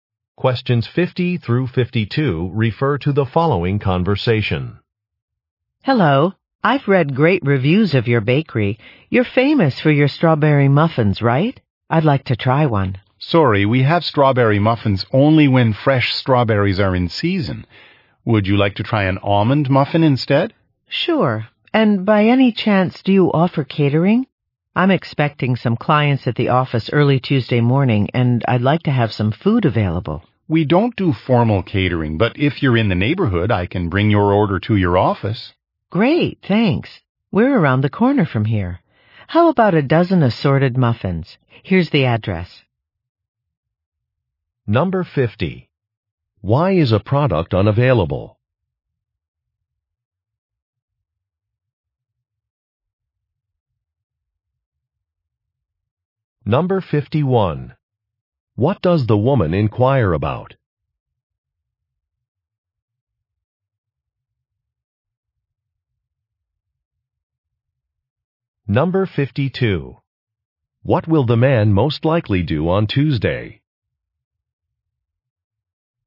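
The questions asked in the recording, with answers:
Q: Why is a product unavailable?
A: Strawberries are not in season

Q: What does the woman inquire about?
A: Catering

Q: What will the man most likely do on Tuesday?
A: Deliver muffins to her office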